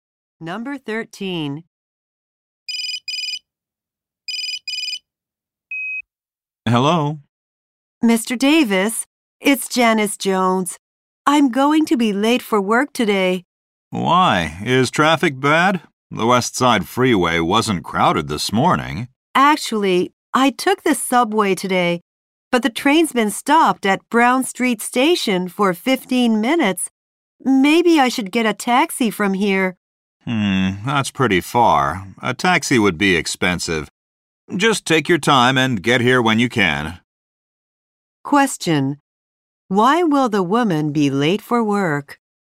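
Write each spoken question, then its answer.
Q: Why will the woman be late for work?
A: Her subway train has been stopped at a station.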